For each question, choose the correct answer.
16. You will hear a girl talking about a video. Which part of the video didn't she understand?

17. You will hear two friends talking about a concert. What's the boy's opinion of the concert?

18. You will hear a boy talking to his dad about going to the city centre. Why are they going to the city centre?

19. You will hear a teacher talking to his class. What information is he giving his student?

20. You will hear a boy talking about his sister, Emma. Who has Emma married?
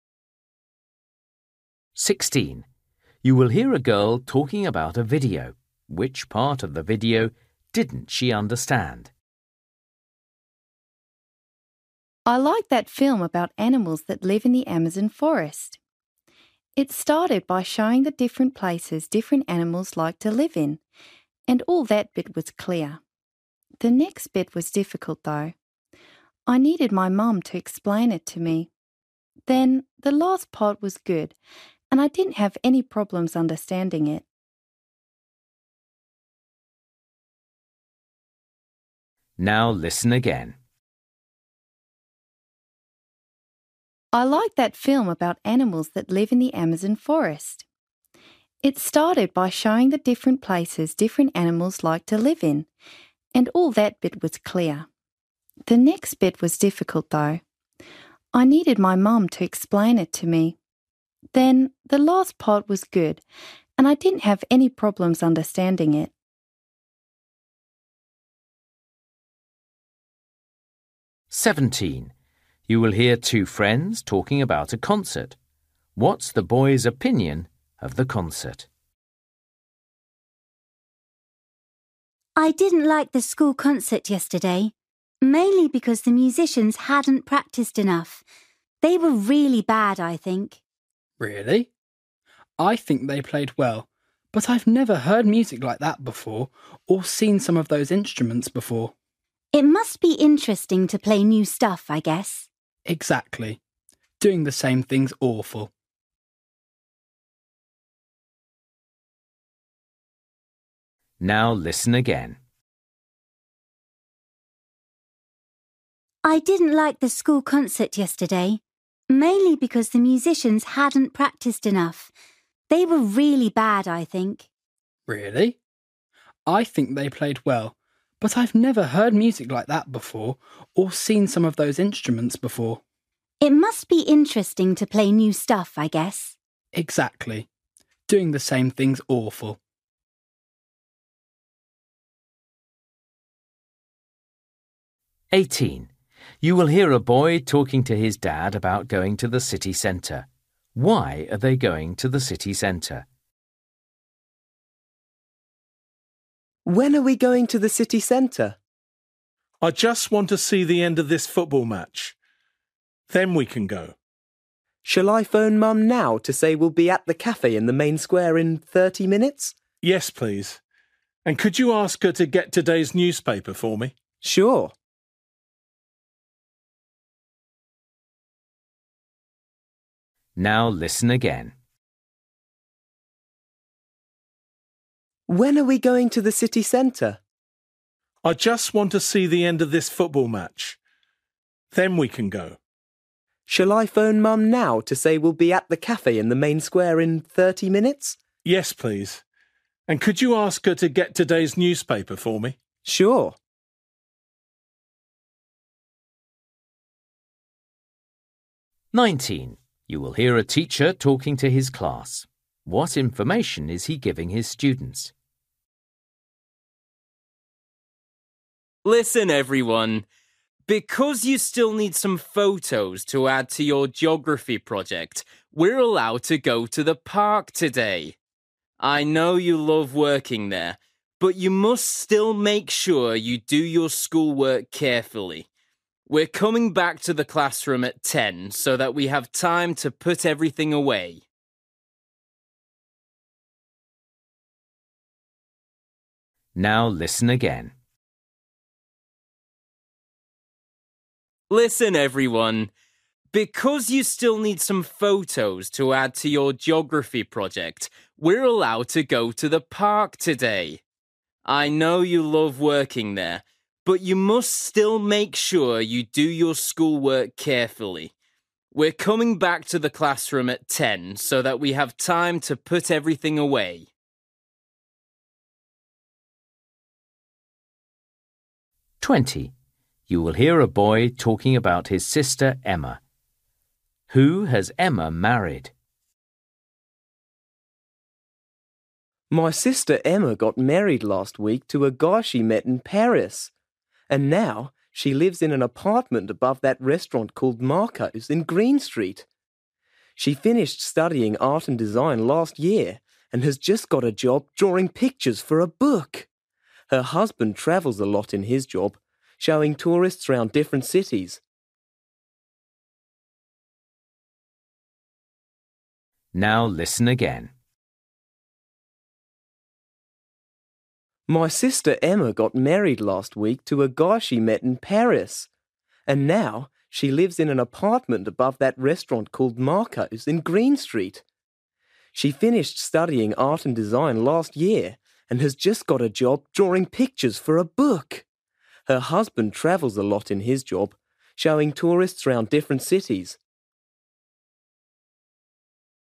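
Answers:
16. the middle part
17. It was interesting because the music was new to him
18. to meet Mum at a cafe
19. The class is going to the park to take photos for their geography project
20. a tour guide

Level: Luyện nghe trình độ A2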